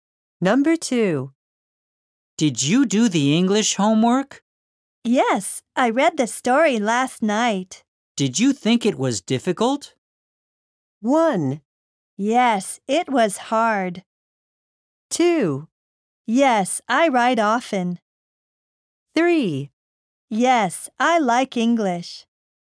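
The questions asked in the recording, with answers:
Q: Did you think it was difficult?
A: 1: Yes, it was hard.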